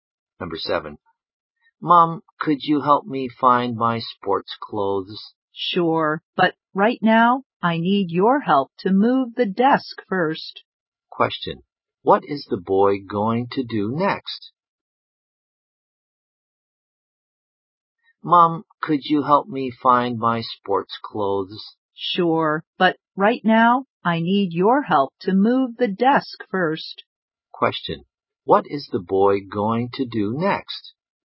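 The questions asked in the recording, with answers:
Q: Question. What is the boy going to do next?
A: Help move the desk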